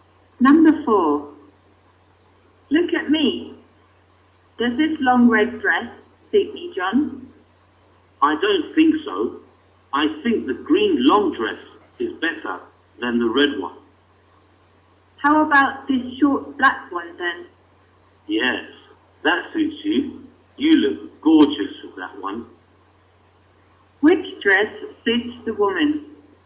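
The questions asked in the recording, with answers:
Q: Which dress suits the woman?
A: The short black dress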